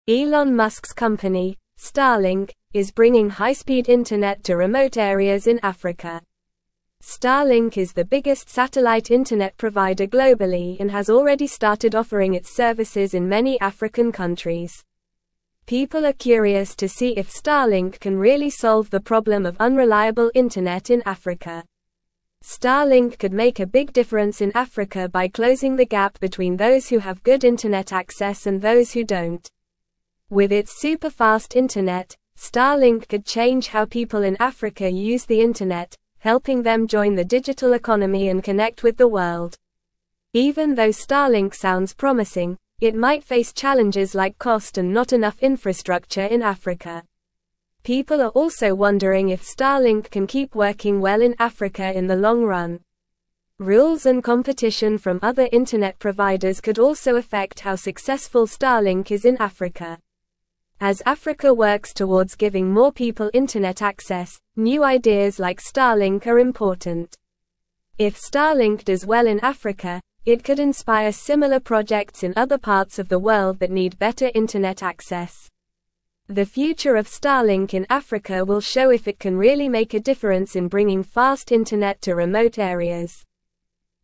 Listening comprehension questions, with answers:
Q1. Elon Musk's company, Starlink, is (1)______ high-speed internet to (2)______ areas in Africa.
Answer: bringing

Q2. Elon Musk's company, Starlink, is (1)______ high-speed internet to (2)______ areas in Africa.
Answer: remote

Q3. People are curious to see if Starlink can really solve the (3)______ of (4)______ internet in Africa.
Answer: problem

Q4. People are curious to see if Starlink can really solve the (3)______ of (4)______ internet in Africa.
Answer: unreliable

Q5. Starlink could make a big (5)______ in Africa by closing the gap between those who have good (6)______ access and those who don't.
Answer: difference

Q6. Starlink could make a big (5)______ in Africa by closing the gap between those who have good (6)______ access and those who don't.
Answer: internet

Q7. With its superfast internet, Starlink could change how people in Africa use the internet, helping them join the (7)______ economy and connect with the (8)______.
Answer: digital

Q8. With its superfast internet, Starlink could change how people in Africa use the internet, helping them join the (7)______ economy and connect with the (8)______.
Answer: world

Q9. Even though Starlink sounds promising, it might face (9)______ like cost and not enough (10)______ in Africa.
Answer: challenges

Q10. Even though Starlink sounds promising, it might face (9)______ like cost and not enough (10)______ in Africa.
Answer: infrastructure

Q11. (11)______ are also wondering if Starlink can keep working well in Africa in the long run.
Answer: People

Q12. Rules and competition from other internet providers could also affect how (12)______ Starlink is in Africa.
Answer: successful

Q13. As Africa works towards giving more (13)______ internet access, new ideas like Starlink are important.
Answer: people

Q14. If Starlink does well in Africa, it could inspire similar (14)______ in (15)______ parts of the world that need better internet access.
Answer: projects

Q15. If Starlink does well in Africa, it could inspire similar (14)______ in (15)______ parts of the world that need better internet access.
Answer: other

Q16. The (16)______ of Starlink in Africa will show if it can really make a difference in bringing fast internet to remote areas.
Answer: future

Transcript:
Elon Musk's company, Starlink, is bringing high-speed internet to remote areas in Africa. Starlink is the biggest satellite internet provider globally and has already started offering its services in many African countries. People are curious to see if Starlink can really solve the problem of unreliable internet in Africa.
Starlink could make a big difference in Africa by closing the gap between those who have good internet access and those who don't. With its superfast internet, Starlink could change how people in Africa use the internet, helping them join the digital economy and connect with the world.
Even though Starlink sounds promising, it might face challenges like cost and not enough infrastructure in Africa. People are also wondering if Starlink can keep working well in Africa in the long run. Rules and competition from other internet providers could also affect how successful Starlink is in Africa.
As Africa works towards giving more people internet access, new ideas like Starlink are important. If Starlink does well in Africa, it could inspire similar projects in other parts of the world that need better internet access. The future of Starlink in Africa will show if it can really make a difference in bringing fast internet to remote areas.

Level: Level 3